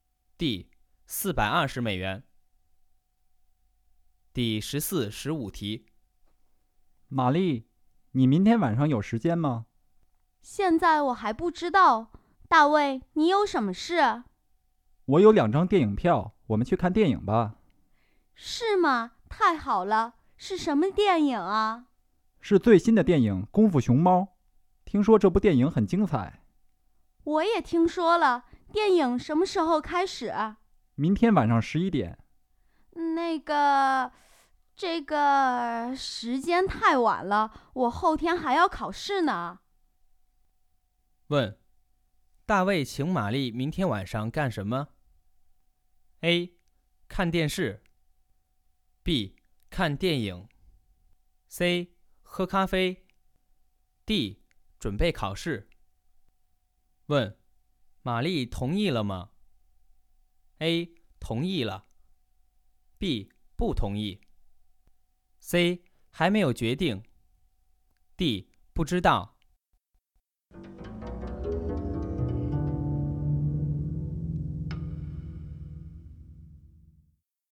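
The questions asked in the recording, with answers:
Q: 问,大卫请玛丽明天晚上干什么?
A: B: 看电影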